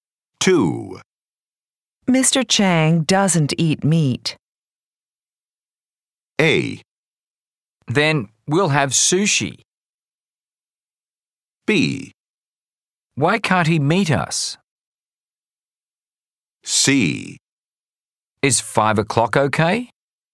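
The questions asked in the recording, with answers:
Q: Mr. Chang doesn't eat meat.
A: A: Then we'll have sushi.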